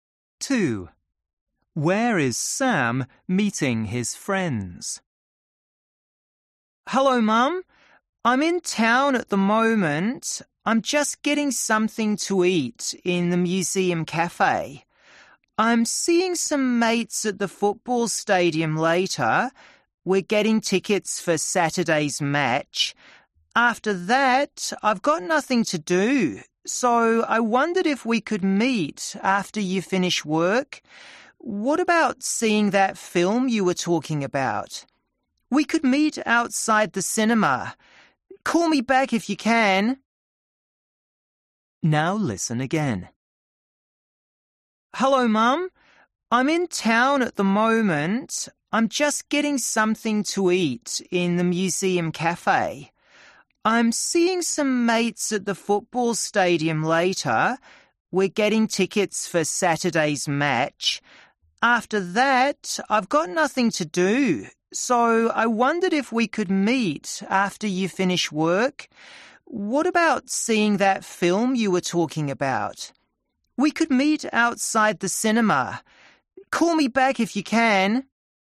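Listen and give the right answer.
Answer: at the football stadium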